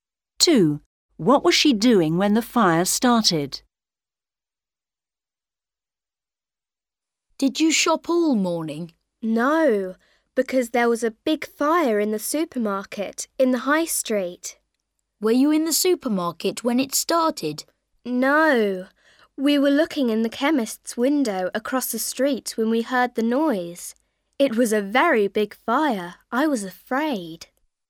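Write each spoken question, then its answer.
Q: What was she doing when the fire started?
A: looking in the chemist's window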